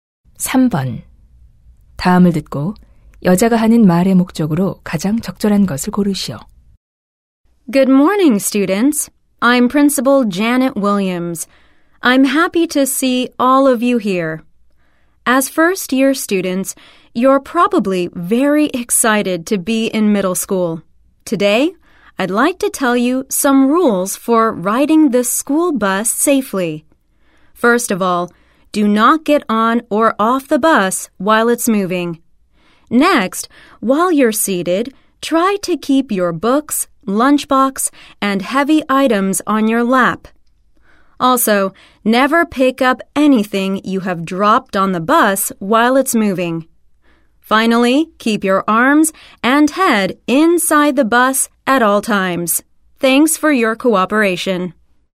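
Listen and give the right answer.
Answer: 스쿨버스 안전 수칙을 안내하려고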